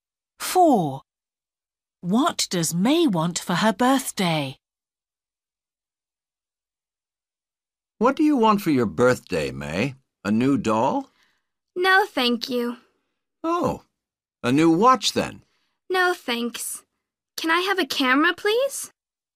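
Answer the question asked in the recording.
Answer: A camera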